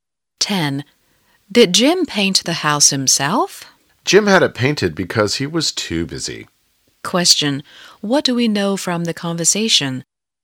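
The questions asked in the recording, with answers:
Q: Question. What do we know from the conversation?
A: Jim had someone else paint the house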